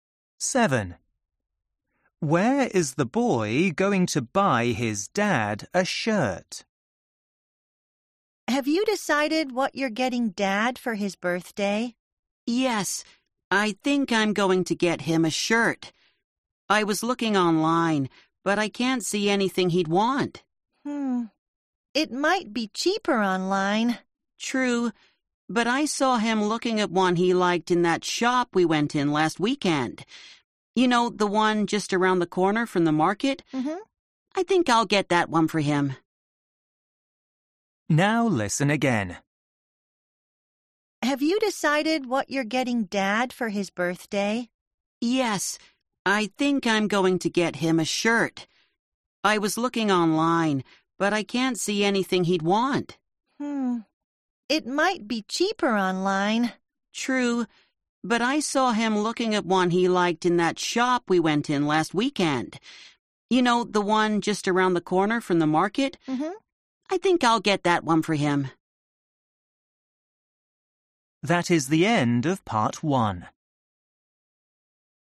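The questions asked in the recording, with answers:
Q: Where is the boy going to buy his dad a shirt?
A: at a shop near the market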